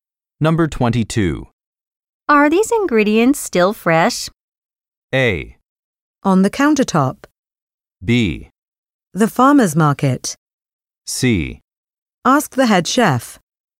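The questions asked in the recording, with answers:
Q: Are these ingredients still fresh?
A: C: Ask the head chef.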